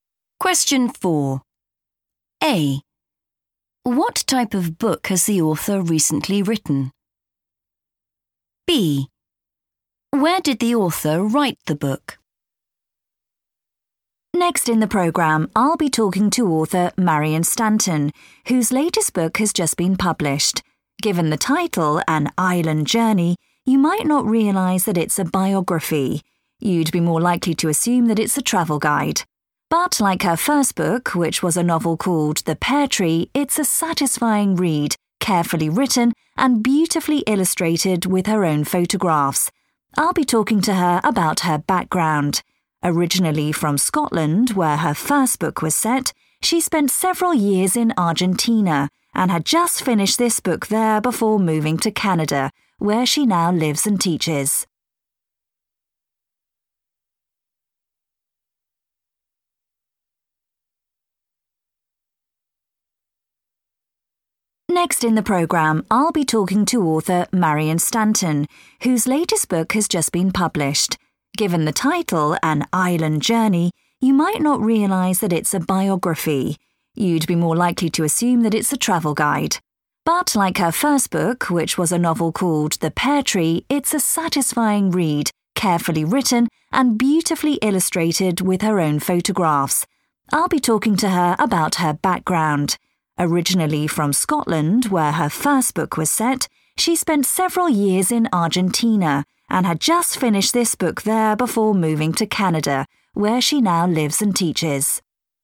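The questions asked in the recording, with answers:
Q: What type of book has the author recently written?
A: a biography

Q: Where did the author write the book?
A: Argentina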